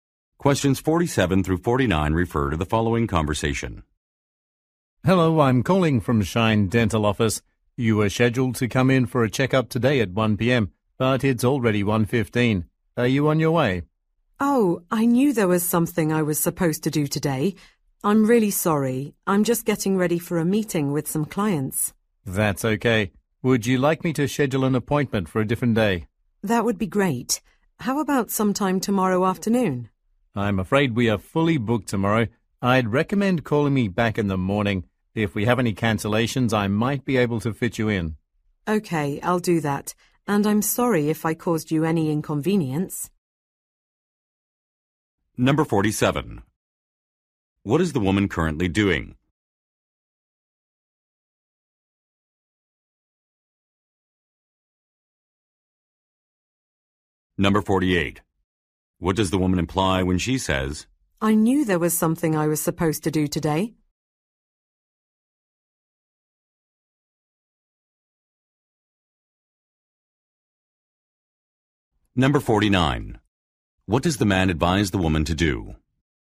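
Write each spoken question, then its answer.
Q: What is the woman currently doing?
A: Getting ready for a meeting with clients

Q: What does the woman imply when she says,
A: She forgot about her appointment

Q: What does the man advise the woman to do?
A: Call back in the morning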